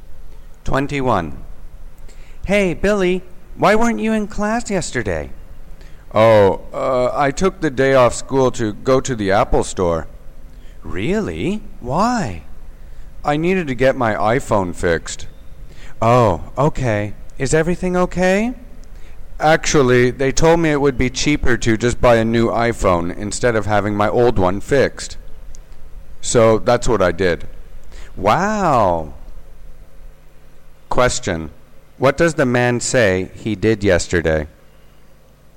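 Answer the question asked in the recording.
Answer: He went to the Apple store and bought a new iPhone.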